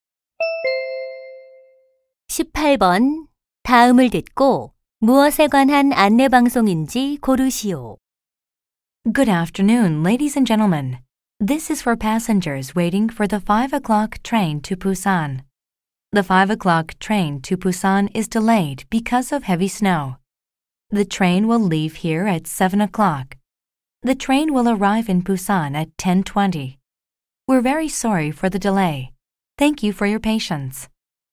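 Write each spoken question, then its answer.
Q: 다음을 듣고 무엇에 관한 안내 방송인지 고르시오.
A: 폭설로 인한 부산행 기차 지연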